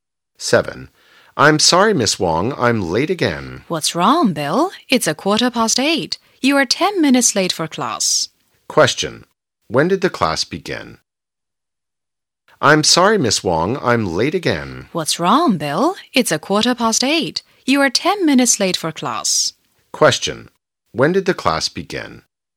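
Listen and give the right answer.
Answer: At 8:05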